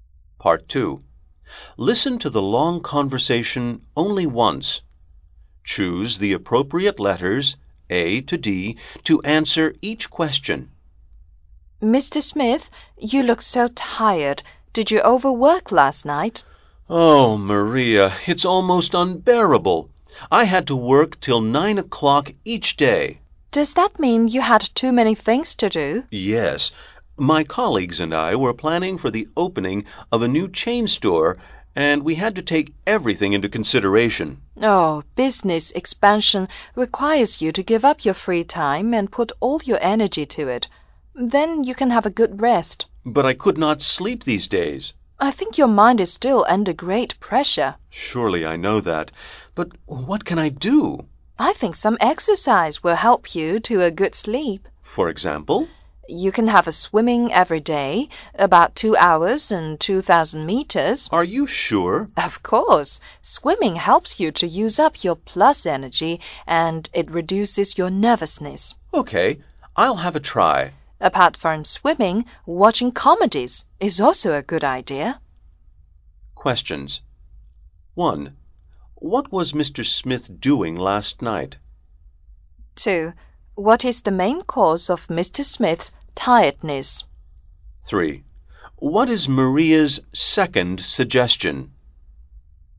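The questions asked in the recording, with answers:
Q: What is Maria's second suggestion?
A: Watching comedies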